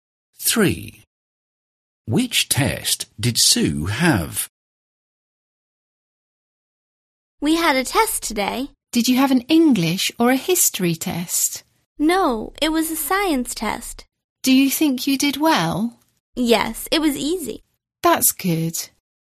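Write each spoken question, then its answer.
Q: Which test did Sue have?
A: a science test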